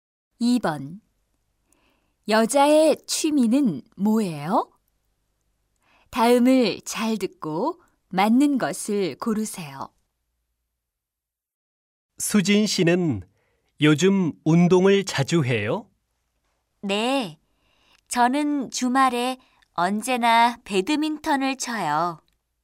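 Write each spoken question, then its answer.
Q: 여자의 취미는 뭐예요?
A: 배드민턴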